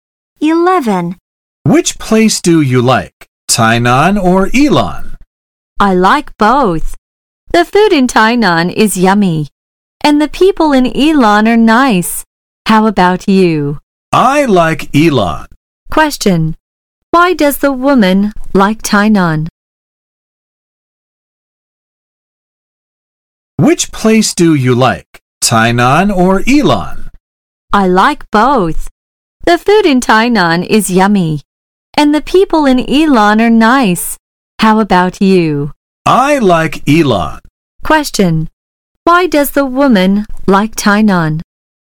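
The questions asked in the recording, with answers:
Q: Why does the woman like Tainan?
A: Because the food in Tainan is yummy.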